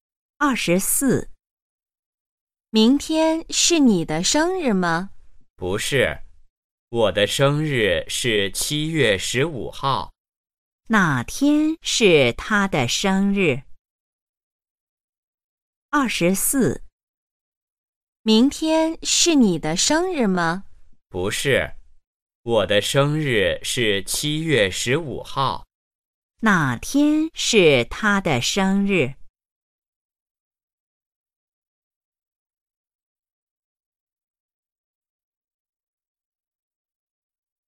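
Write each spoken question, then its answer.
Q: 哪天是他的生日?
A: 七月十五号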